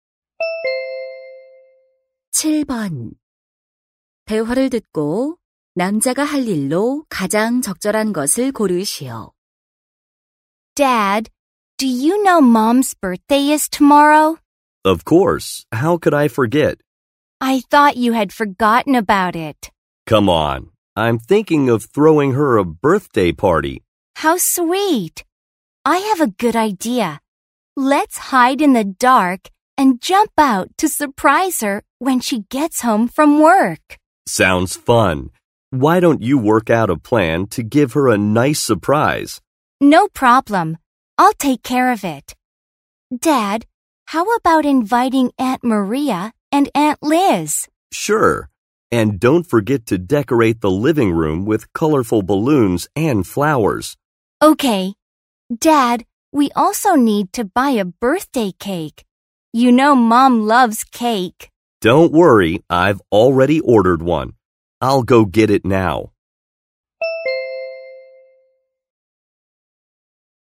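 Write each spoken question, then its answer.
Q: 대화를 듣고 남자가 할 일로 가장 적절한 것을 고르시오.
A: 주문한 생일 케이크 가지러 가기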